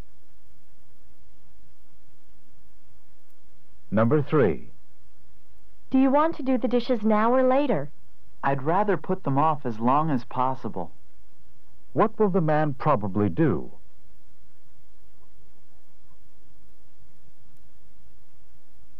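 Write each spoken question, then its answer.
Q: What will the man probably do?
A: Wash the dishes later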